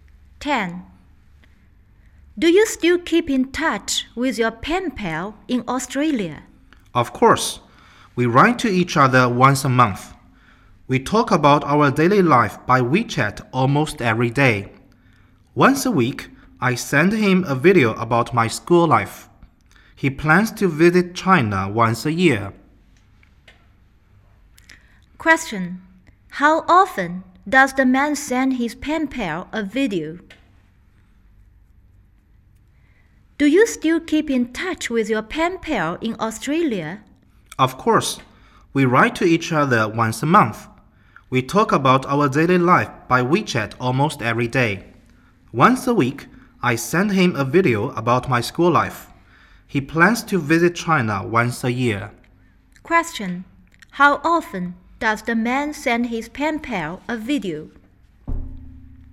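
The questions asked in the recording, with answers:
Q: How often does the man send his pen pal a video?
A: Once a week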